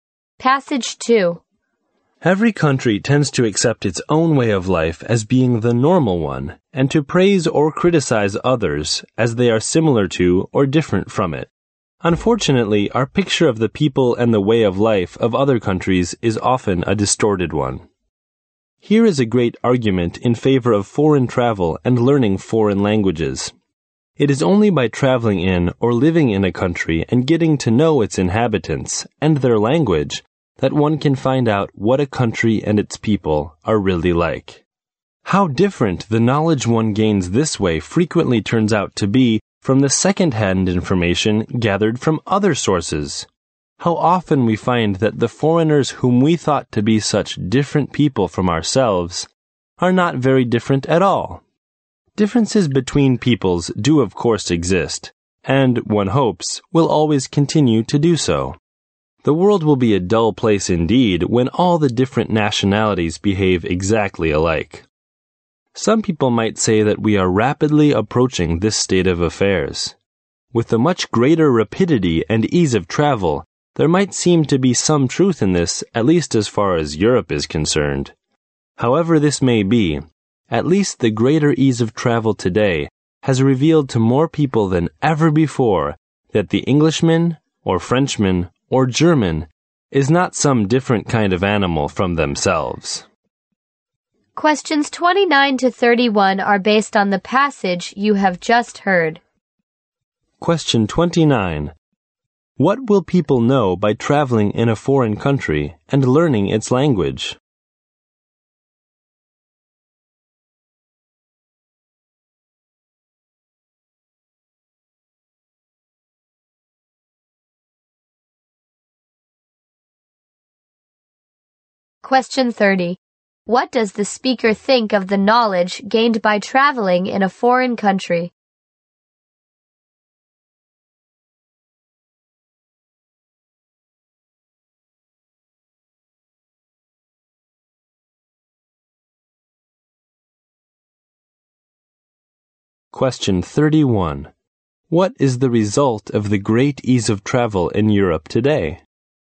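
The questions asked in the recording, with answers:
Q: What will people know by traveling in a foreign country and learning its language?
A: What the country and its people are really like

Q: What does the speaker think of the knowledge gained by traveling in a foreign country?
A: It is often very different from second-hand information

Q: What is the result of the great ease of travel in Europe today?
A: More people see that foreigners are not so different from themselves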